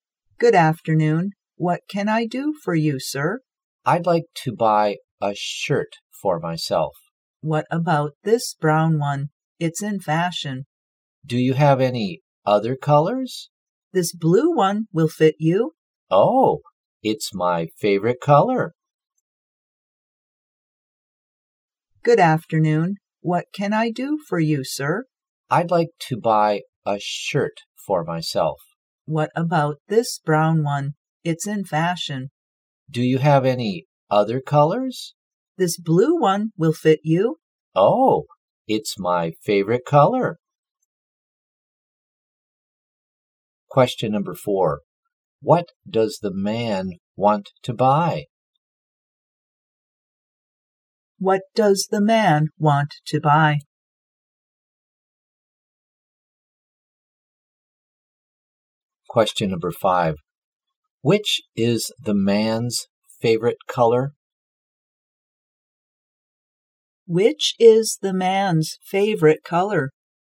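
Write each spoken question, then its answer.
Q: What does the man want to buy?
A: A shirt

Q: Which is the man's favorite color?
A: Blue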